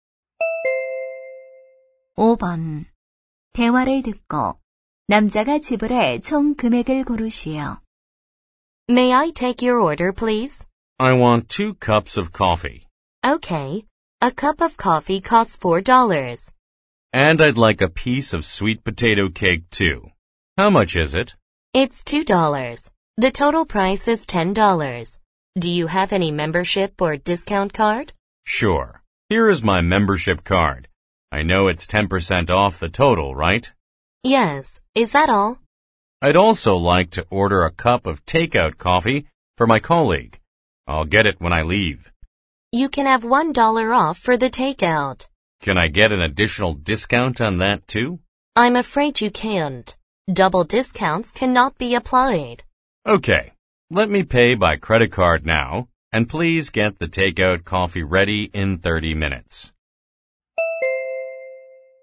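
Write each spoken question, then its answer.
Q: 대화를 듣고 남자가 지불해 총 금액을 고르시오.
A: 12달러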